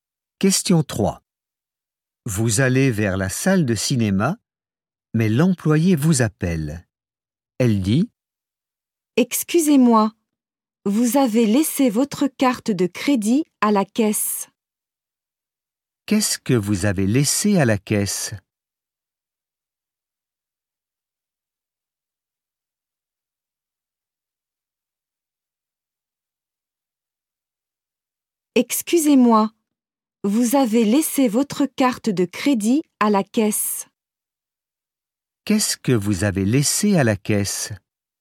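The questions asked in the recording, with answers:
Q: Qu'est-ce que vous avez laissé à la caisse ?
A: Votre carte de crédit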